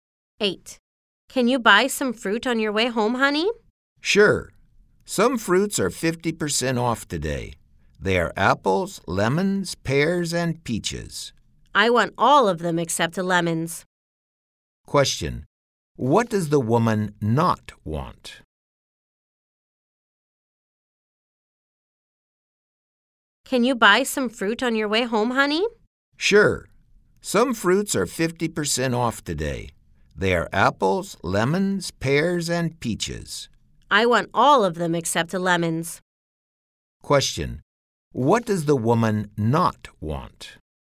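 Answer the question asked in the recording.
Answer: Lemons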